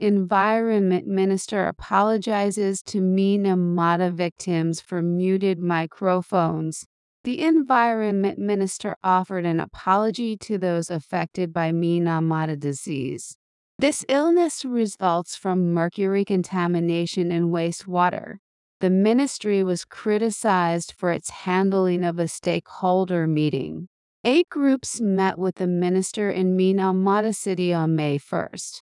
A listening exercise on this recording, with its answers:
英語ニュースの音声を聞き、各空欄に入る英文を正確に書き取ってください。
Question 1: The Environment Minister ( ) by Minamata disease.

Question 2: ( ) mercury contamination in wastewater.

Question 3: The ministry ( ) of a stakeholder meeting.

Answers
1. offered an apology to those affected
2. This illness results from
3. was criticized for its handling

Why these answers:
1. 「affected」の前に関係代名詞が省略される用法です。発音されていない「who」を書いてしまった人は文法理解が浅いです。
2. 「result from(〜が原因で起きる)」という表現をしっかり覚えておきましょう。
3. 弱く曖昧に発音される機能語を聞き取るには、文脈から正しく理解する文法力・読解力が必要です。音だけに頼っていては正解できないことがあります。

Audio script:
Env. Minister Apologizes to Minamata Victims for Muted Microphones
The Environment Minister offered an apology to those affected by Minamata disease.
This illness results from mercury contamination in wastewater.
The ministry was criticized for its handling of a stakeholder meeting.
Eight groups met with the minister in Minamata City on May 1.

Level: 中級脱出